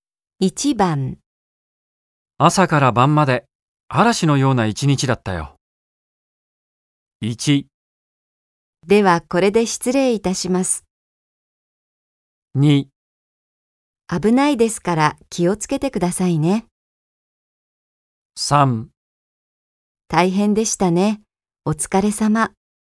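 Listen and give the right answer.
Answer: 3: 大変でしたね。お疲れ様。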